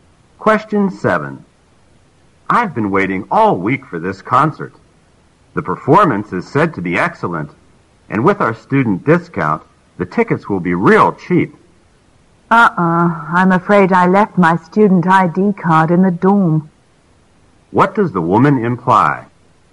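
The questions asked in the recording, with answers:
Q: What does the woman imply?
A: She may not get the student discount because she left her student ID in the dorm.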